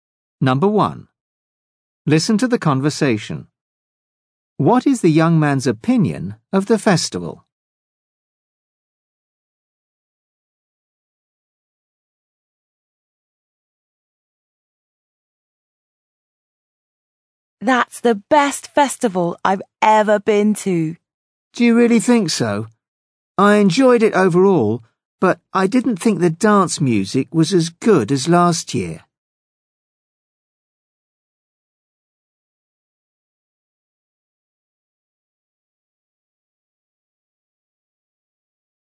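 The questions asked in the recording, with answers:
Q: What is the young man's opinion of the festival?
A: He thinks it's the best festival he's ever been to.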